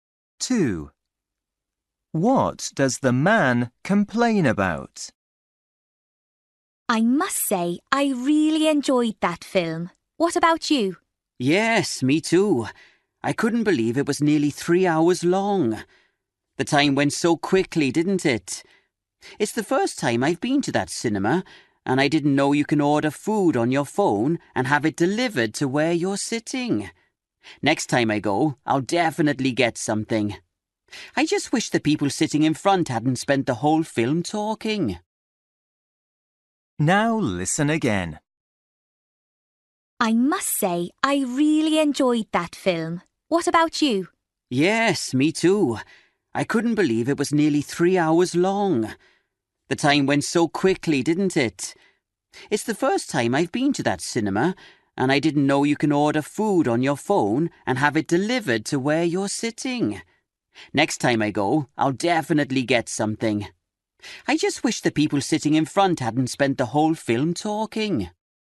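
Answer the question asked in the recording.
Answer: people in front talking during the film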